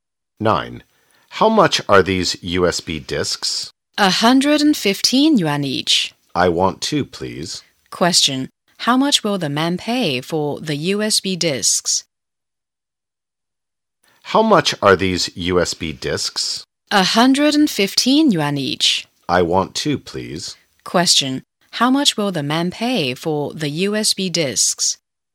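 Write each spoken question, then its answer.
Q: How much will the man pay for the USB discs?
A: 230 yuan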